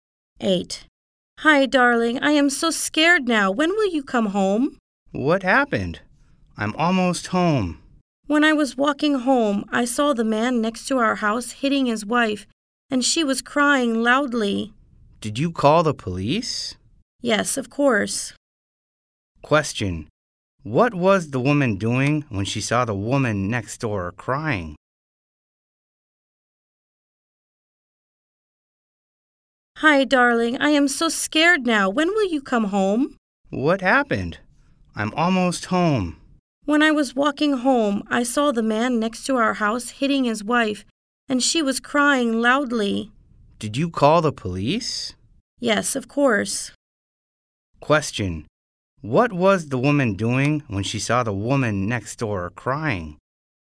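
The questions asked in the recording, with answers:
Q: What was the woman doing when she saw the woman next door crying?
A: Walking home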